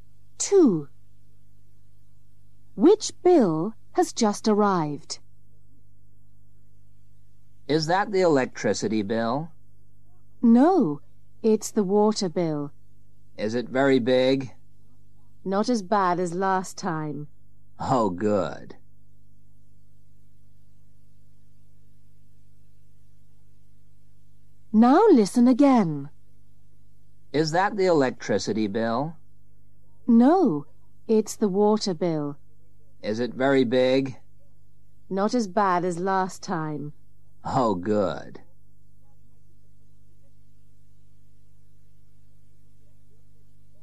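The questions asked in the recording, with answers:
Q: Which bill has just arrived?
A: the water bill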